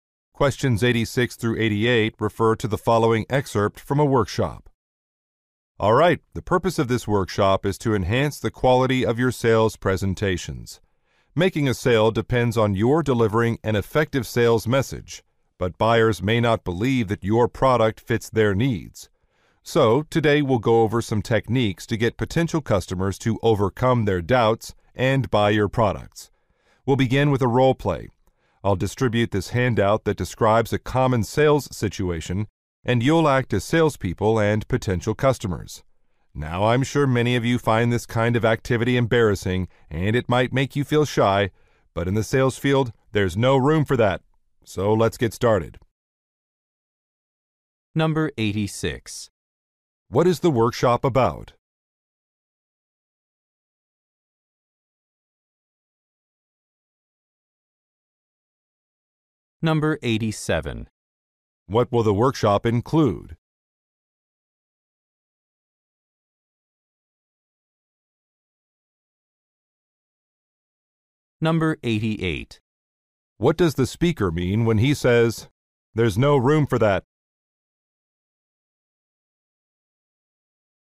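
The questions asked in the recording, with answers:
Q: What is the workshop about?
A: Improving sales presentations

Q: What will the workshop include?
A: A role play

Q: What does the speaker mean when he says, "There's no room for that"?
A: Salespeople must not be shy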